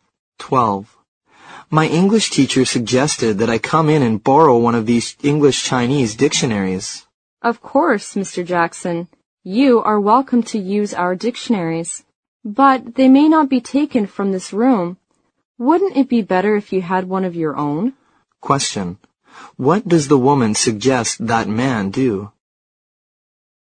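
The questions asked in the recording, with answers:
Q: What does the woman suggest that man do?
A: Get a dictionary of his own.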